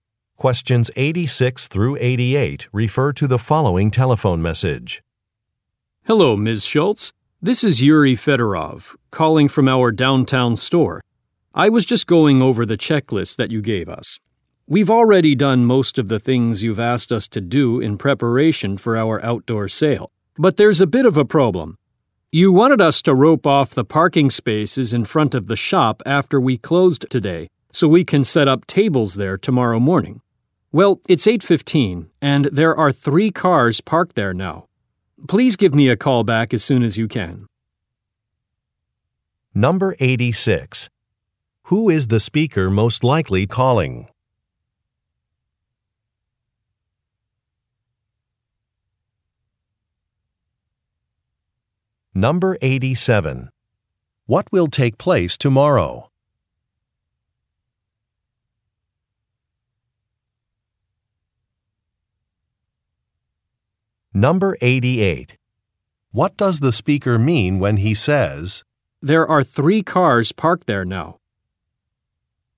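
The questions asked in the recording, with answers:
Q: What will take place tomorrow?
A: An outdoor sale

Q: What does the speaker mean when he says,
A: He can't rope off the parking spaces as asked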